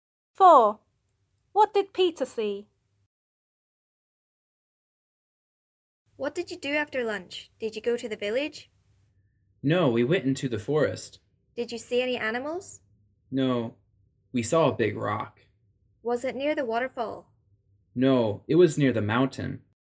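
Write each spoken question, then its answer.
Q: What did Peter see?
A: A big rock near the mountain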